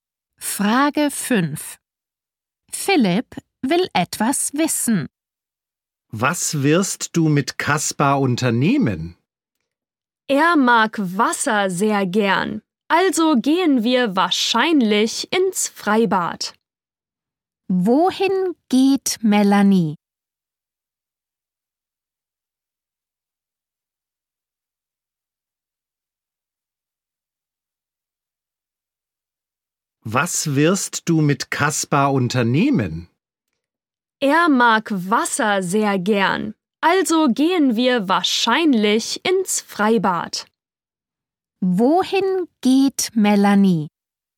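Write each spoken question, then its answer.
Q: Wohin geht Melanie?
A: Ins Freibad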